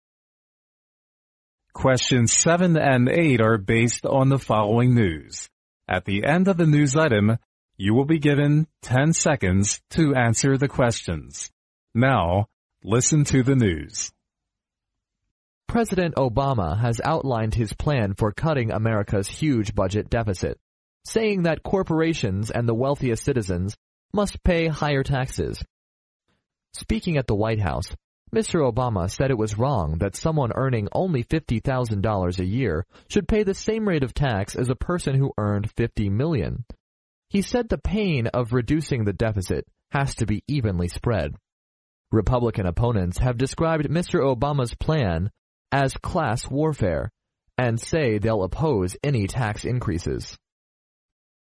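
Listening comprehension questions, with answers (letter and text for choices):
Now listen to the news.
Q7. What is the main idea of Mr. Obama's plan for cutting America's huge budget deficit?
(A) Americans should pay the same rate of tax.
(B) Companies and the wealthiest citizens must pay higher taxes.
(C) The current tax rate should be increased sharply.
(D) Republican opponents must cooperate with the government.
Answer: (B) Companies and the wealthiest citizens must pay higher taxes.

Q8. What do Republican opponents think of Mr. Obama's plan?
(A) They think it will cause class warfare.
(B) They believe it may increase the deficit.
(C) They guess it will spread evenly.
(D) They wish it may reduce the deficit.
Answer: (A) They think it will cause class warfare.

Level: 英语专业四级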